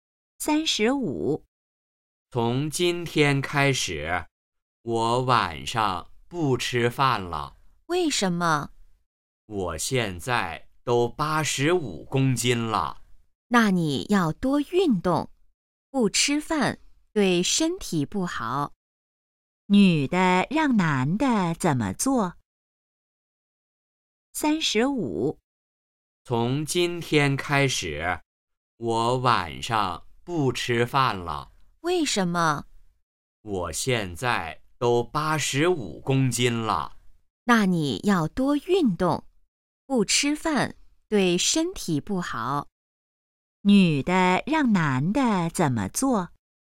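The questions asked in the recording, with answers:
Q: 女的让男的怎么做?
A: 多运动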